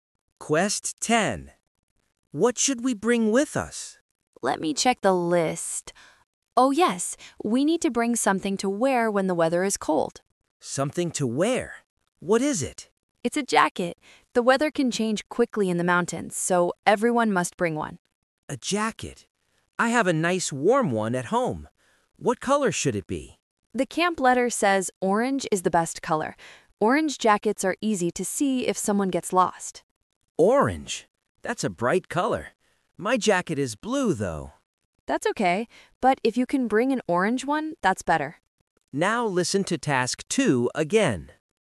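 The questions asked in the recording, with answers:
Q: What should we bring with us?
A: an orange jacket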